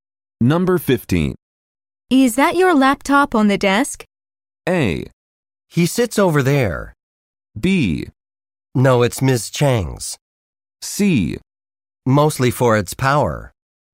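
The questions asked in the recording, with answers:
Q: Is that your laptop on the desk?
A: B: No, it's Ms. Chang's.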